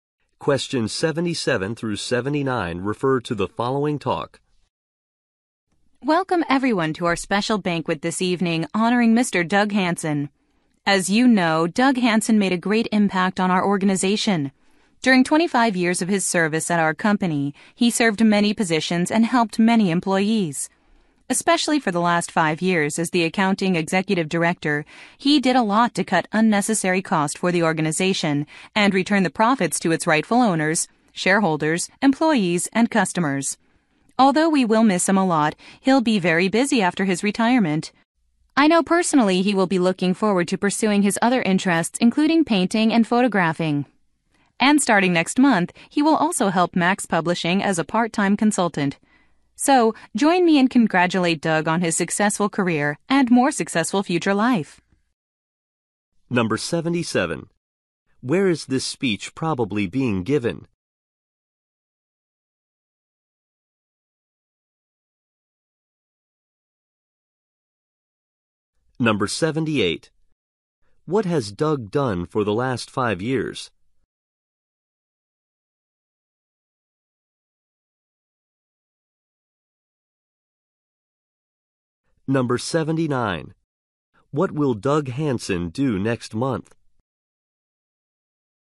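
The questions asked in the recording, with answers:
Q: Where is this speech probably being given?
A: At a retirement banquet

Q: What has Doug done for the last 5 years?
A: Served as accounting executive director, cutting unnecessary costs

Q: What will Doug Hansen do next month?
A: Work as a part-time consultant for Max Publishing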